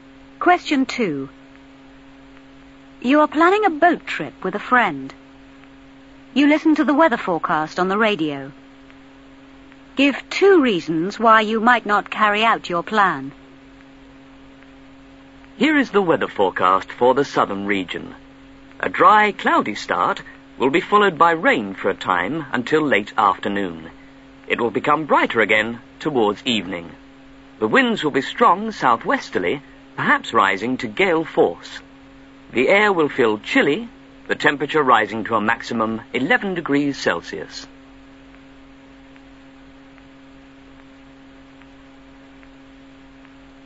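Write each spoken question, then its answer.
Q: Give 2 reasons why you might not carry out your plan.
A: Rain; strong winds, perhaps gale force (also chilly)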